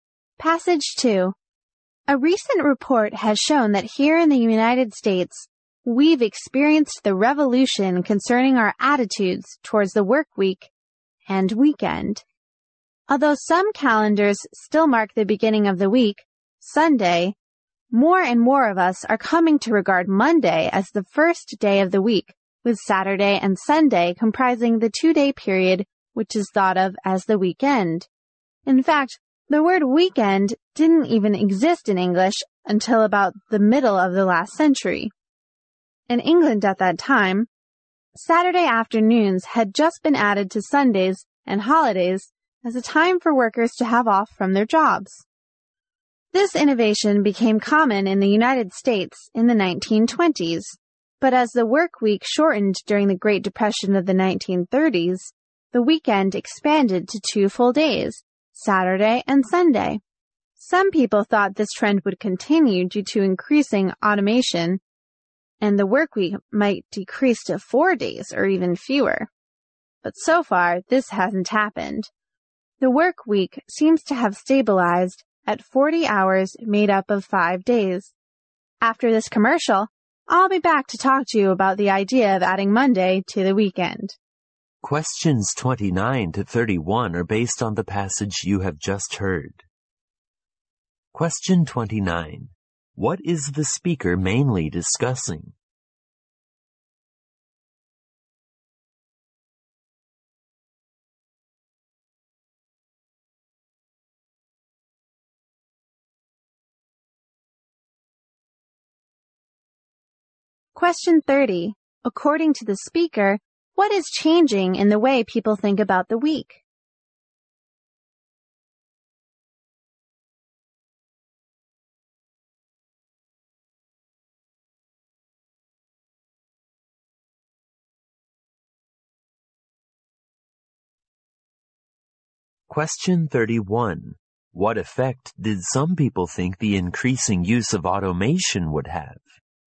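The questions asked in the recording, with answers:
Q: What is the speaker mainly discussing?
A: The history of the weekend and the work week

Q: According to the speaker, what is changing in the way people think about the week?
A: More people regard Monday as the first day of the week

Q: What effect did some people think the increasing use of automation would have?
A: The work week would shrink to four days or fewer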